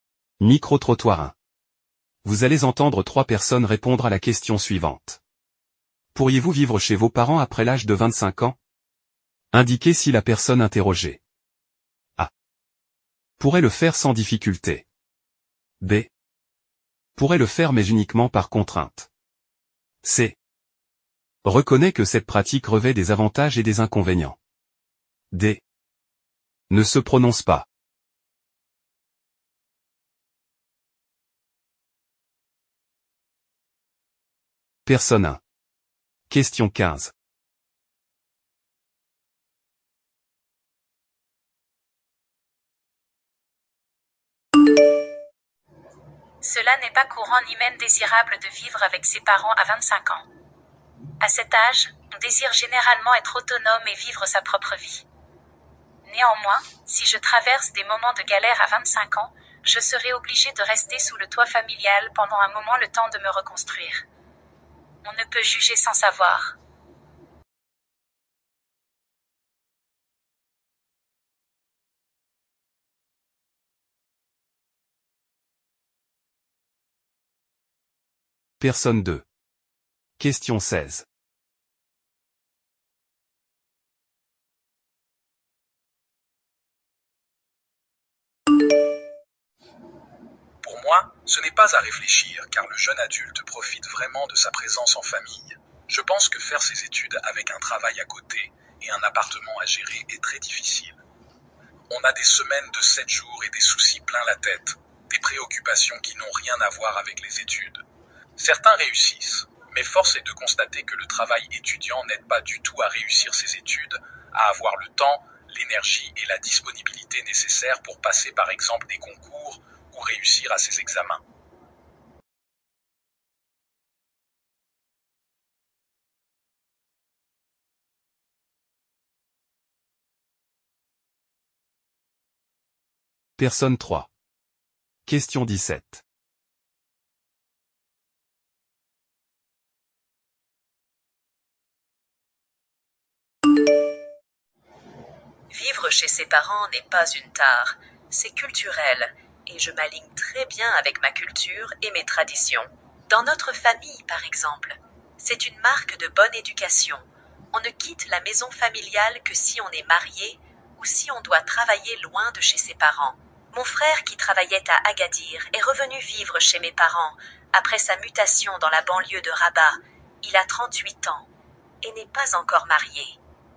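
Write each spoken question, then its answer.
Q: Pourriez-vous vivre chez vos parents après l'âge de 25 ans?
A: B: pourrait le faire mais uniquement par contrainte

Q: Pourriez-vous vivre chez vos parents après l'âge de 25 ans?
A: A: pourrait le faire sans difficulté

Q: Pourriez-vous vivre chez vos parents après l'âge de 25 ans?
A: A: pourrait le faire sans difficulté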